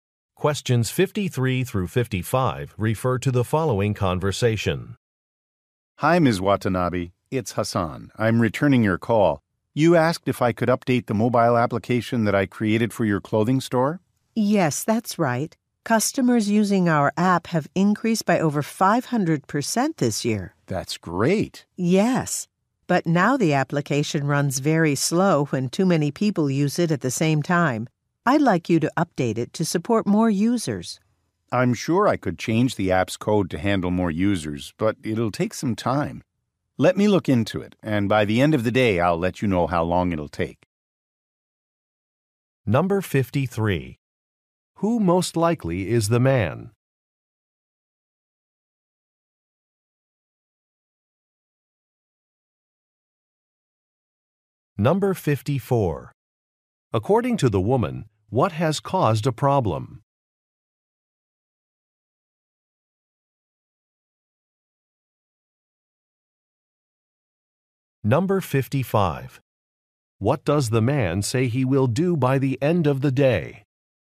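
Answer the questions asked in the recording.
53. An app developer
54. A large increase in app users
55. Tell her how long the update will take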